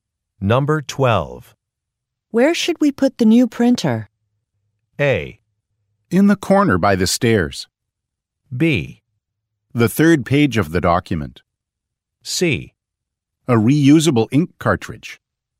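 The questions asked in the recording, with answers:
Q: Where should we put the new printer?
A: A: In the corner by the stairs.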